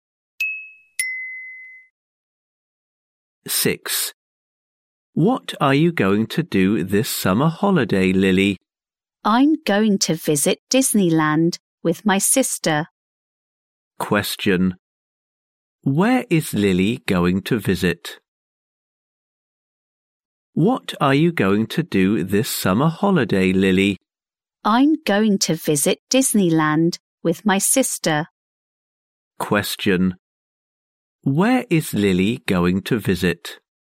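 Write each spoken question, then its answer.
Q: Where is Lily going to visit?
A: Disneyland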